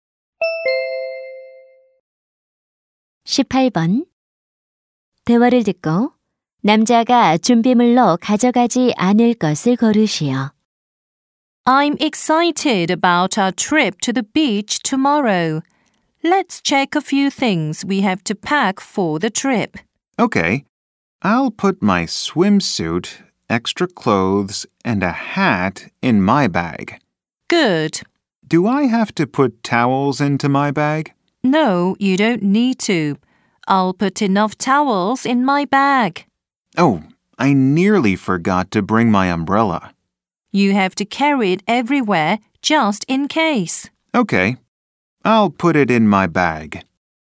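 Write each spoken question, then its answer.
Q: 남자가 준비물로 가져가지 않을 것을 고르시오.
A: 수건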